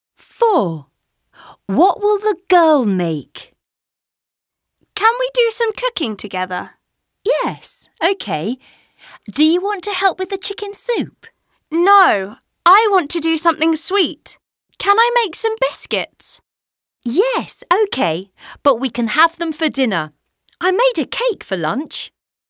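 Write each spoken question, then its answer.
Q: What will the girl make?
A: biscuits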